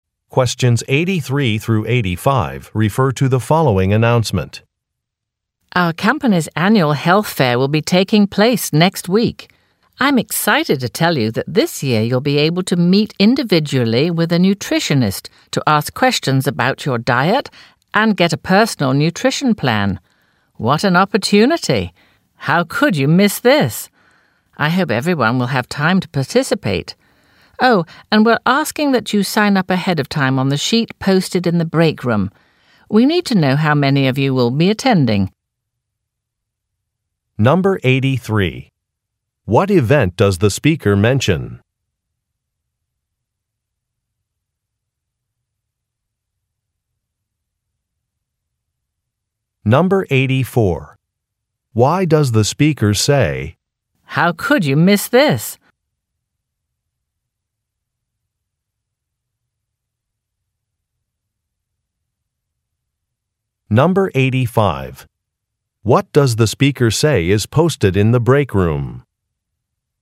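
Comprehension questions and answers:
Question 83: What event does the speaker mention?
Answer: A company health fair

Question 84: Why does the speaker say, "Now could you miss this"?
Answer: To encourage participation

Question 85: What does the speaker say is posted in the break room?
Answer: A sign-up sheet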